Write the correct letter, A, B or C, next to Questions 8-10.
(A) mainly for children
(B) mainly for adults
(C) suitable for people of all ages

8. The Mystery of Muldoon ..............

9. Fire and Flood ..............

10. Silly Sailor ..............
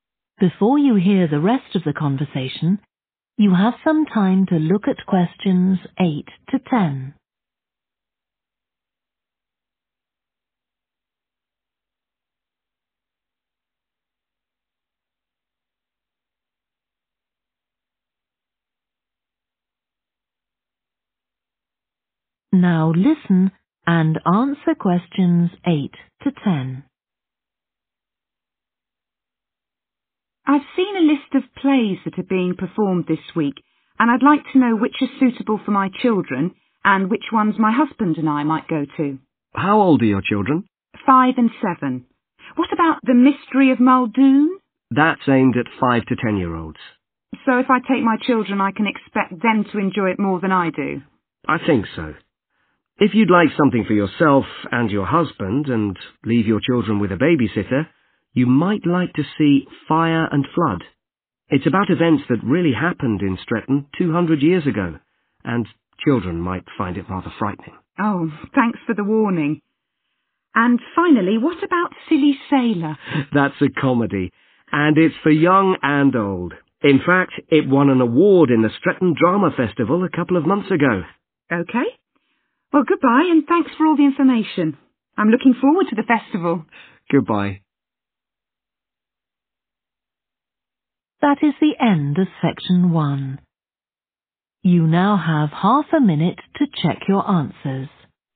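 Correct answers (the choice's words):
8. mainly for children
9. mainly for adults
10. suitable for people of all ages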